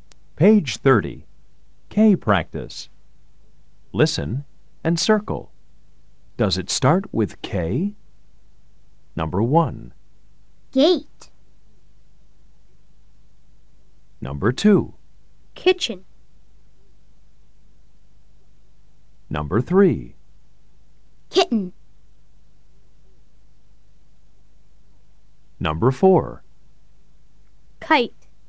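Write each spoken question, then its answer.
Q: Gate.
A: No

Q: Kitchen.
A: Yes

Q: Kitten.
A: Yes

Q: Kite.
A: Yes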